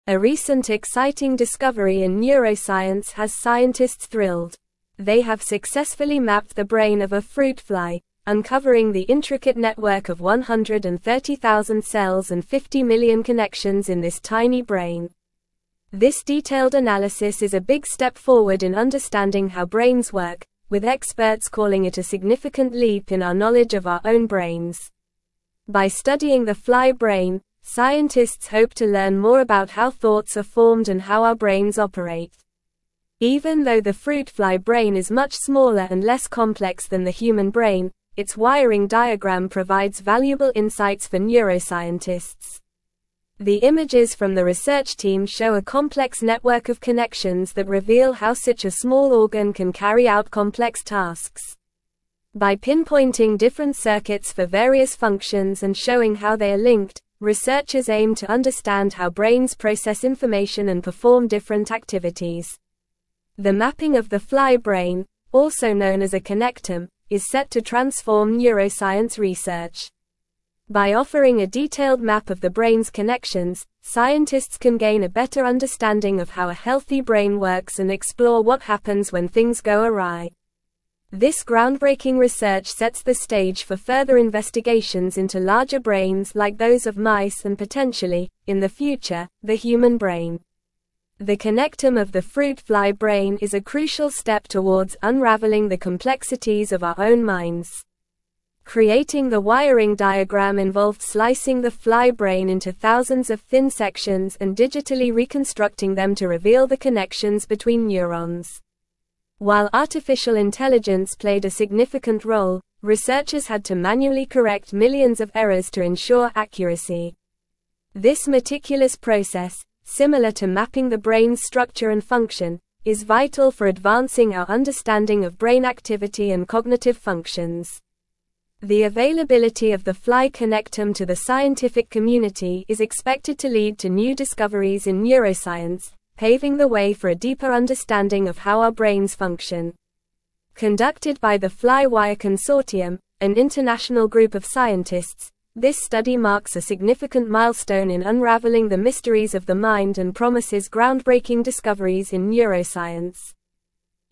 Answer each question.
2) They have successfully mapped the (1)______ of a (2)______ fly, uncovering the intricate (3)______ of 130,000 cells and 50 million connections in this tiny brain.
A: fruit

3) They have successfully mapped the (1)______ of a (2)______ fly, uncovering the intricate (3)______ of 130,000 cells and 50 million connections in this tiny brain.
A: network

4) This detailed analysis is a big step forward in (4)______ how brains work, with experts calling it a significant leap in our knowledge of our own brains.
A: understanding

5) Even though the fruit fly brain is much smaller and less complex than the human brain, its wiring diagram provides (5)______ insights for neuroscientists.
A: valuable

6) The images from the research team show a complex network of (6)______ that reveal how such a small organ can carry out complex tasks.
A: connections

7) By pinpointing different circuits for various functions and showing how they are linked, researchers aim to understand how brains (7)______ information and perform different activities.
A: process

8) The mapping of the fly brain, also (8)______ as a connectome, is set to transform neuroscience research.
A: known

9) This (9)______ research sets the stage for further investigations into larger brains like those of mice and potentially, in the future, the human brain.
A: groundbreaking

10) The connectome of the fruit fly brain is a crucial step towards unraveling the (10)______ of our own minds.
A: complexities

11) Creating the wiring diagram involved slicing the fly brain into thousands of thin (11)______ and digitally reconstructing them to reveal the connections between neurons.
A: sections

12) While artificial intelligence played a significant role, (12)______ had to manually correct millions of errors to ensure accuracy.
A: researchers

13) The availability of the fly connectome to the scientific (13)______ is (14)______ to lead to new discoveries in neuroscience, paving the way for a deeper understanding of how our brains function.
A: community

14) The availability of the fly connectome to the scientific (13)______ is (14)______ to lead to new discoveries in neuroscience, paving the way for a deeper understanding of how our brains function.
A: expected

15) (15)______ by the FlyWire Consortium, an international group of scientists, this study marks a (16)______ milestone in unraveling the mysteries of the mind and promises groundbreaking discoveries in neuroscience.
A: Conducted

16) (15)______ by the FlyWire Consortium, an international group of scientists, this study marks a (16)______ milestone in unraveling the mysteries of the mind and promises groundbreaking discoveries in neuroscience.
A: significant

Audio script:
A recent exciting discovery in neuroscience has scientists thrilled. They have successfully mapped the brain of a fruit fly, uncovering the intricate network of 130,000 cells and 50 million connections in this tiny brain. This detailed analysis is a big step forward in understanding how brains work, with experts calling it a significant leap in our knowledge of our own brains. By studying the fly brain, scientists hope to learn more about how thoughts are formed and how our brains operate.
Even though the fruit fly brain is much smaller and less complex than the human brain, its wiring diagram provides valuable insights for neuroscientists. The images from the research team show a complex network of connections that reveal how such a small organ can carry out complex tasks. By pinpointing different circuits for various functions and showing how they are linked, researchers aim to understand how brains process information and perform different activities.
The mapping of the fly brain, also known as a connectome, is set to transform neuroscience research. By offering a detailed map of the brain's connections, scientists can gain a better understanding of how a healthy brain works and explore what happens when things go awry. This groundbreaking research sets the stage for further investigations into larger brains like those of mice and potentially, in the future, the human brain. The connectome of the fruit fly brain is a crucial step towards unraveling the complexities of our own minds.
Creating the wiring diagram involved slicing the fly brain into thousands of thin sections and digitally reconstructing them to reveal the connections between neurons. While artificial intelligence played a significant role, researchers had to manually correct millions of errors to ensure accuracy. This meticulous process, similar to mapping the brain's structure and function, is vital for advancing our understanding of brain activity and cognitive functions. The availability of the fly connectome to the scientific community is expected to lead to new discoveries in neuroscience, paving the way for a deeper understanding of how our brains function. Conducted by the FlyWire Consortium, an international group of scientists, this study marks a significant milestone in unraveling the mysteries of the mind and promises groundbreaking discoveries in neuroscience.

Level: Level 3